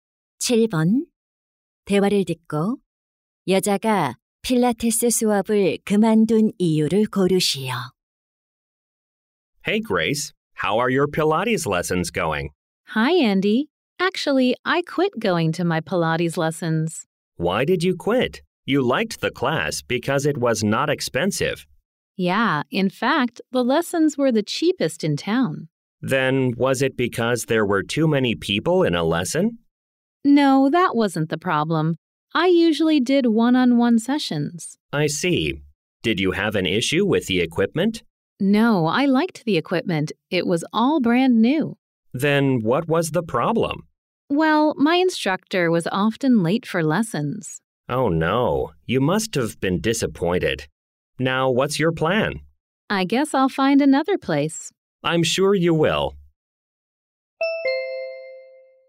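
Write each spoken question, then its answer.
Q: 대화를 듣고 여자가 필라테스 수업을 그만둔 이유를 고르시오.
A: 강사가 수업에 자주 늦어서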